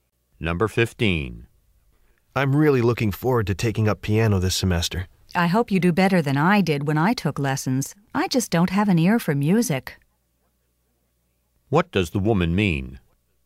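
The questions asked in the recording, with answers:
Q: What does the woman mean?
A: She wasn't good at piano because she has no musical talent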